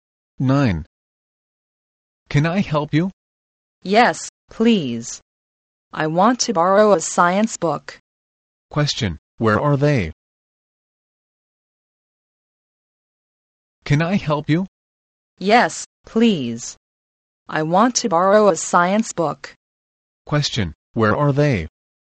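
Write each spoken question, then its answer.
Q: Question, where are they?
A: In a library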